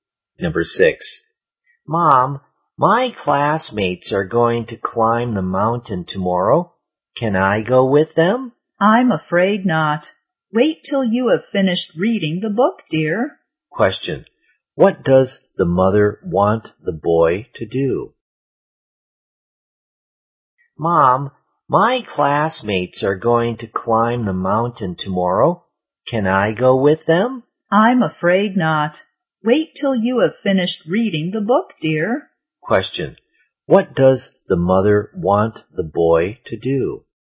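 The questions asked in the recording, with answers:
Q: What does the mother want the boy to do?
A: Finish reading the book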